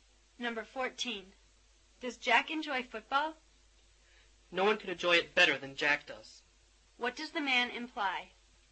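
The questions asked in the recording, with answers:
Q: What does the man imply?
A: Jack enjoys football very much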